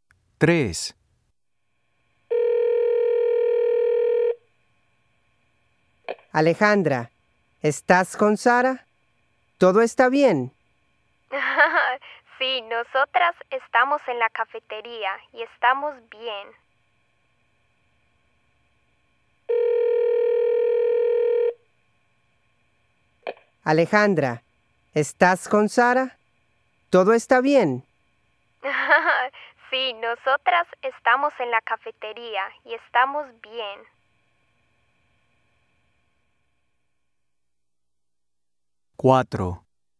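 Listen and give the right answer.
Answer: Sí, están en la cafetería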